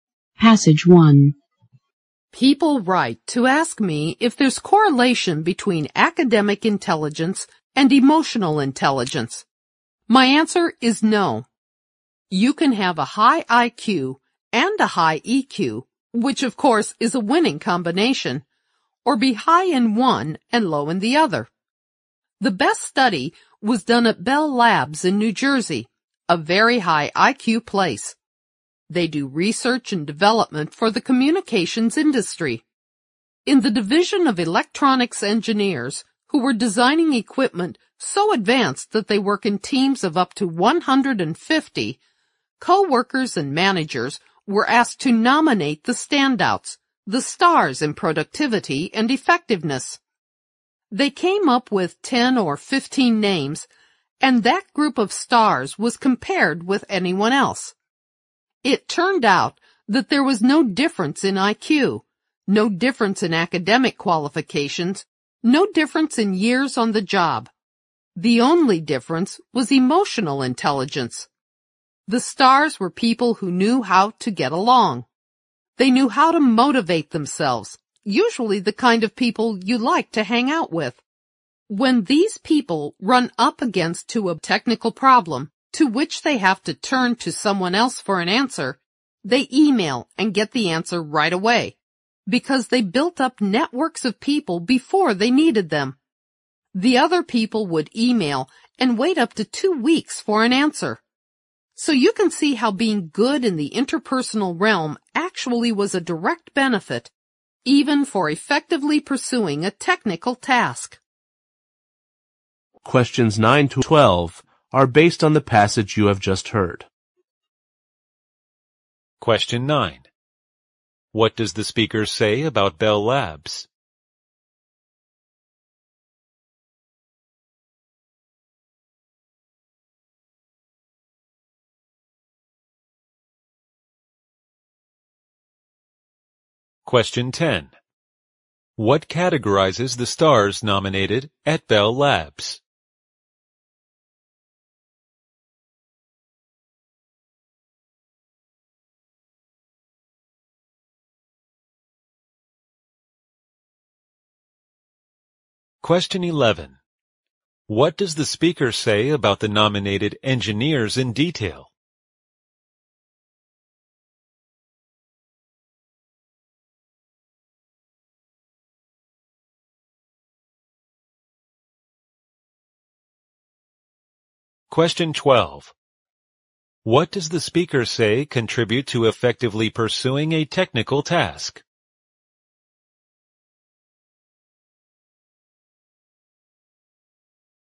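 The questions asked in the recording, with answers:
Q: What does the speaker say contribute to effectively pursuing a technical task?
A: Being good in the interpersonal realm, such as building networks of people.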